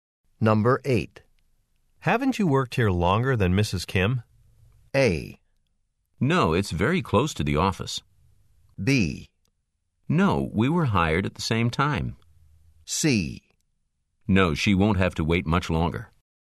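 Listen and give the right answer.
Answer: B: No, we were hired at the same time.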